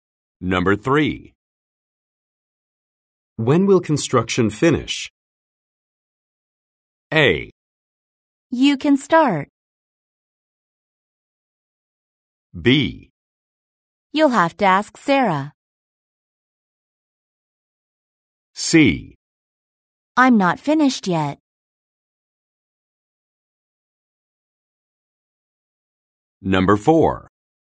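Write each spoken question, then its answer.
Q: When will construction finish?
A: B: You'll have to ask Sarah.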